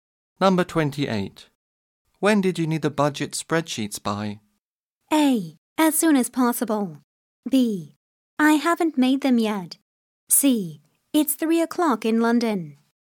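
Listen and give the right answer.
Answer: A: As soon as possible.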